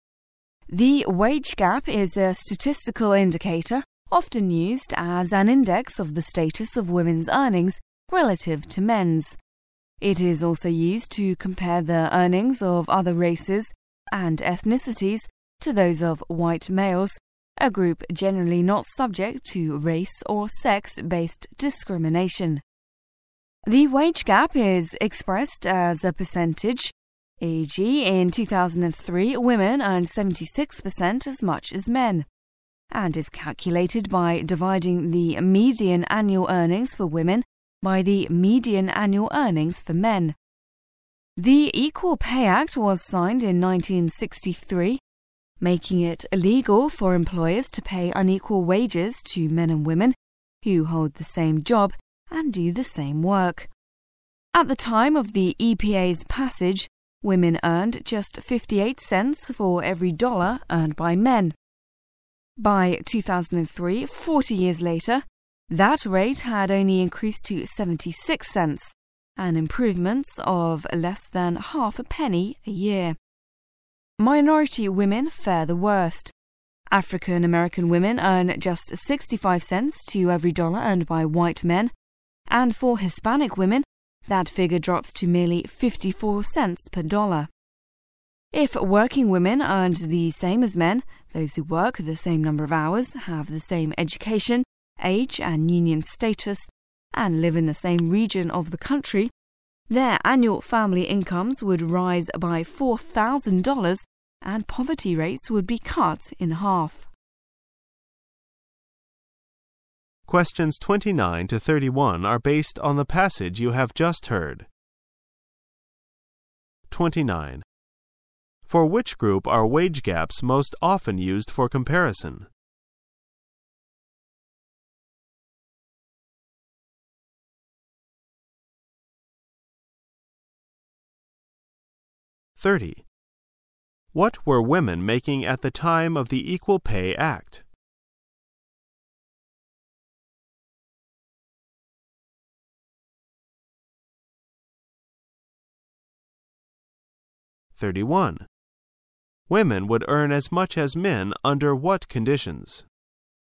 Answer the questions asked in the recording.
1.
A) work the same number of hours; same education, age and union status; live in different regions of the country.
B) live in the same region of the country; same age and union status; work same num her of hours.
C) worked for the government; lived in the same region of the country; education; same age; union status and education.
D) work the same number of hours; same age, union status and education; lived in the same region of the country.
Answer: D) work the same number of hours; same age, union status and education; lived in the same region of the country.
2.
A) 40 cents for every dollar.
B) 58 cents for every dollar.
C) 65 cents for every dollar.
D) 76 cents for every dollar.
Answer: B) 58 cents for every dollar.

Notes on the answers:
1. 此题考查听细节的能力。解题关键是抓住句子"work the same number of hours;same age,union status and education; lived in the same region of the country"。
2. 此题考查从内容推测的能力。关键点是听到course,architecture course。I never seem to have any free time。意为"我好像没有任何闲暇时间"。

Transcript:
[解析] 29-31 The wage gap is a statistical indicator often used as an index of the status of women's earnings relative to men's. It is also used to compare the earnings of other races and ethnicities to those of white males, a group generally not subject to race --or sex--based discrimination. The wage gap is expressed as a percentage (e. , in 2003, women earned 76% as much as men) and is calculated by dividing the median annual earnings for women by the median annual earnings for men. The Equal Pay Act was signed in 1963, making it illegal for employers to pay unequal wages to men and women who hold the same job and do the same work. At the time of the EPA's passage, women earned just 58 cents for every dollar earned by men. By 2003, 40 years later, that rate had only increased to 76 cents, an improvement of less than half a penny a year. Minority women fare the worst. African-American women earn just 65 cents to every dollar earned by white men, and for Hispanic women that figure drops to merely 54 cents per dollar. If working women earned the same as men (those who work the same number of hours; have the same education, age, and union status; and live in the same region of the country), their annual family incomes would rise by $4,000 and poverty rates would be cut in half. For Which group are wage gaps most often used for comparison?